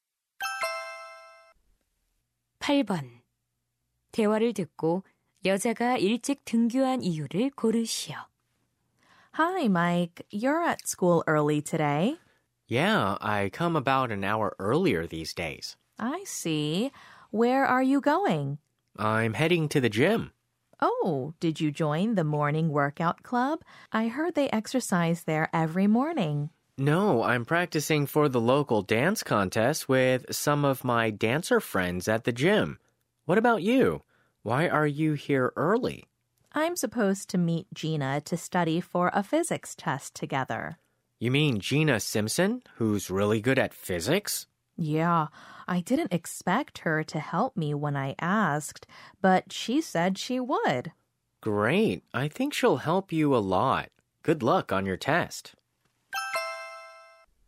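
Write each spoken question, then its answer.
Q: 대화를 듣고 여자가 일찍 등교한 이유를 고르시오.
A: Gina와 물리 시험공부를 하기 위해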